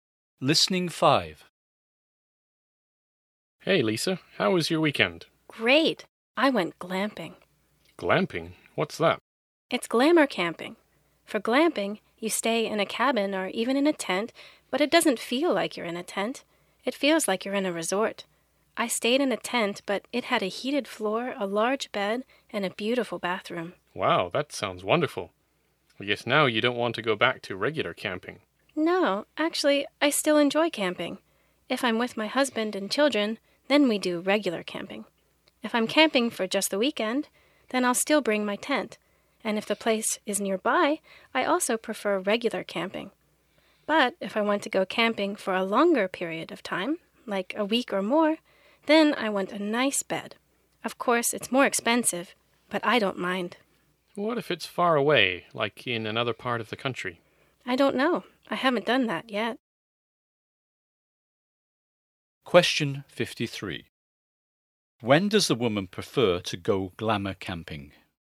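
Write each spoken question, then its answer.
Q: When does the woman prefer to go glamour camping?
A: When she goes camping for a longer time, like a week or more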